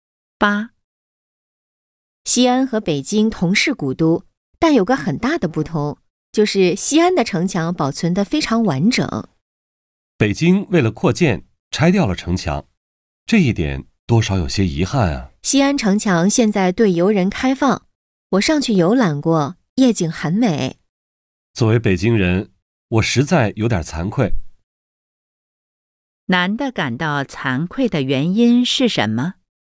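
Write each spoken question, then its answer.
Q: 男的感到惭愧的原因是什么?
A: 北京为了扩建拆掉了城墙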